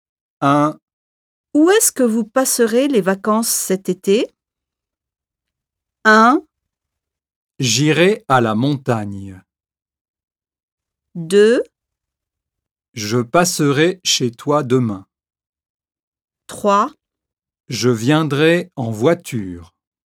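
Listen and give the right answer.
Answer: 1: J'irai à la montagne.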